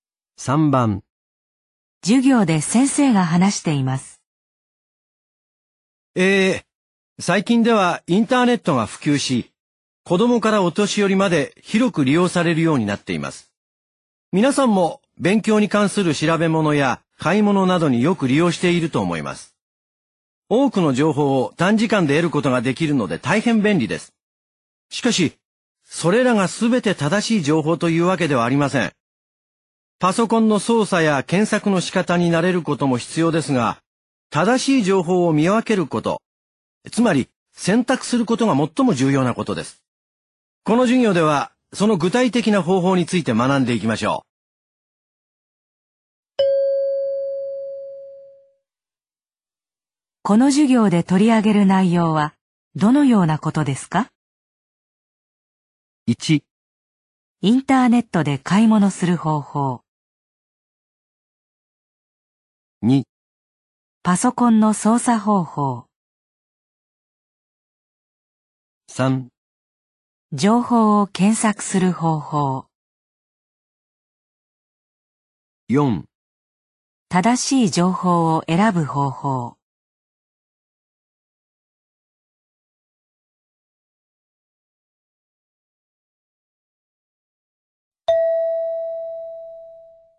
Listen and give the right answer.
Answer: 4

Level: N2 Listening · Test 12